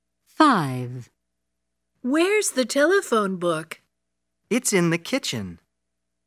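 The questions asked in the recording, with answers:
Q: Where's the telephone book?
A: In the kitchen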